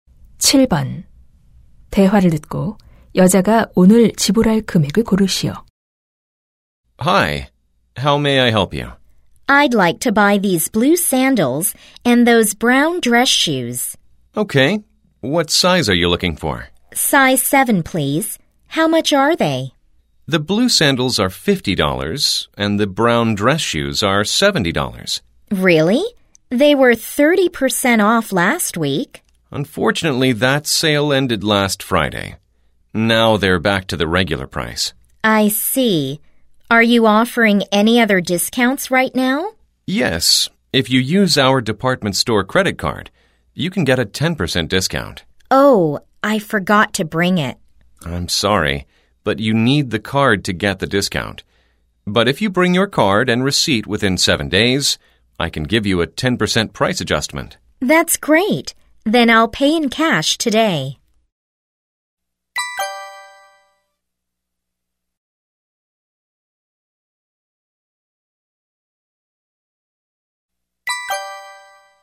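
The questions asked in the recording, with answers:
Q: 대화를 듣고 여자가 오늘 지불할 금액을 고르시오.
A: $120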